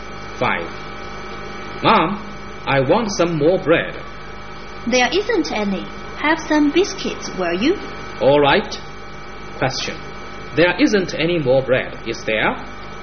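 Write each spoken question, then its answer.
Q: There isn't any more bread, is there?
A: No, there isn't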